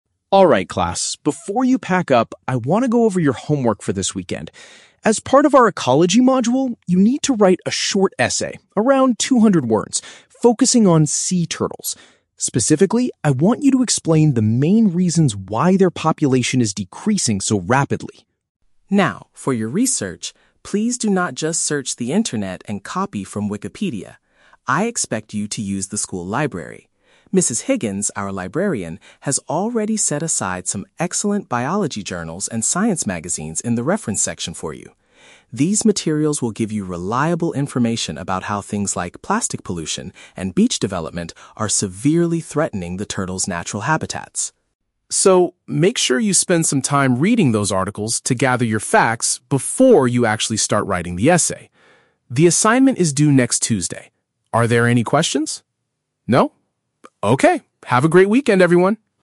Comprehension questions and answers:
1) What is the main topic the students must write about?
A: The reasons why sea turtle numbers are falling.

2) Where does the teacher want the students to find their research materials?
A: In the reference section of the school library.

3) What type of materials did the librarian prepare for the students?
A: Science magazines and biology journals.

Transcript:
Biology Teacher: Alright, class, before you pack up, I want to go over your homework for this weekend. As part of our ecology module, you need to write a short essay—around 200 words—focusing on sea turtles. Specifically, I want you to explain the main reasons why their population is decreasing so rapidly.
Now, for your research, please do not just search the internet and copy from Wikipedia. I expect you to use the school library. Mrs. Higgins, our librarian, has already set aside some excellent biology journals and science magazines in the reference section for you. These materials will give you reliable information about how things like plastic pollution and beach development are severely threatening the turtles' natural habitats.
So, make sure you spend some time reading those articles to gather your facts before you actually start writing the essay. The assignment is due next Tuesday. Are there any questions? No? Okay, have a great weekend, everyone!